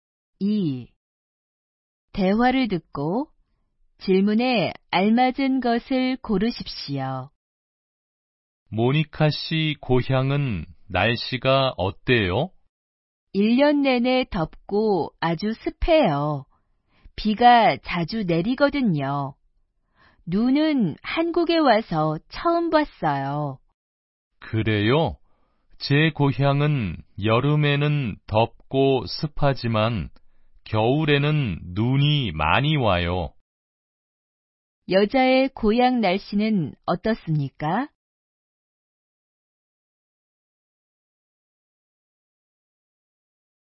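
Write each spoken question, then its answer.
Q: 여자의 고향 날씨는 어떻습니까?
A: 1년 내내 덥고 습하며 비가 자주 내립니다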